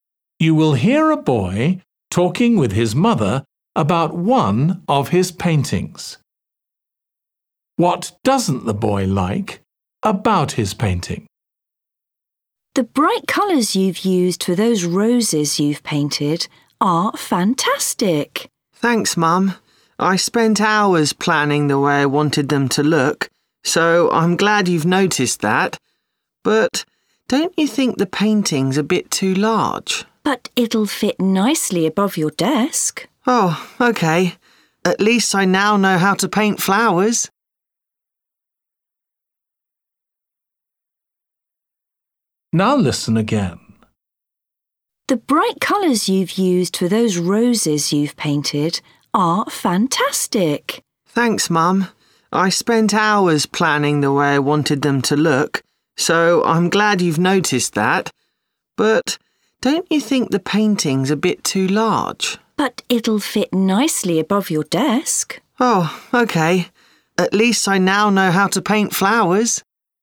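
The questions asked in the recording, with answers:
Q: What doesn't the boy like about his painting?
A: Its size (too large)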